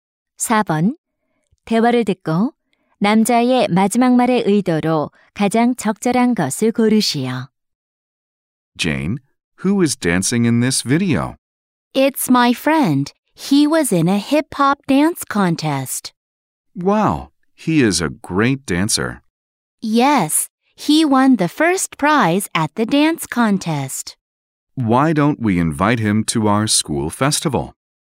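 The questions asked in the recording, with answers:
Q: 대화를 듣고 남자의 마지막 말의 의도로 가장 적절한 것을 고르시오.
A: 제안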